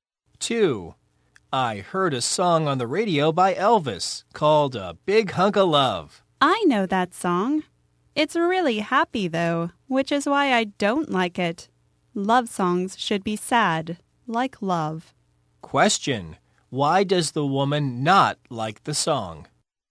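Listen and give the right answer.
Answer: It is happy, but she thinks love songs should be sad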